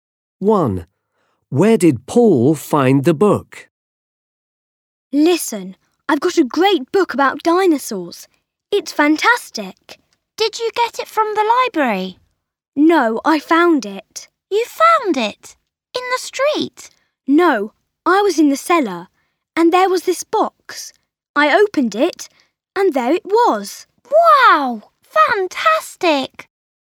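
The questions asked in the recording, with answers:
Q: Where did Paul find the book?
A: In a box in the cellar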